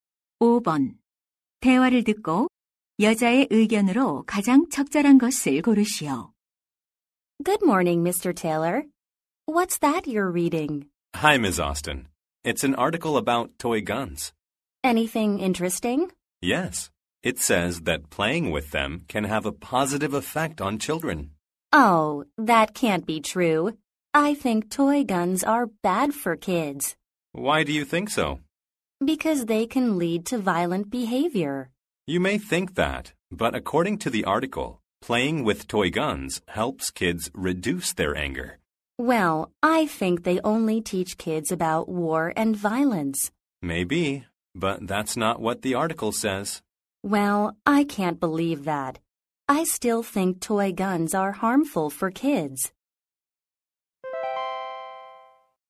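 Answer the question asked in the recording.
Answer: 장난감 총은 아이들에게 해롭다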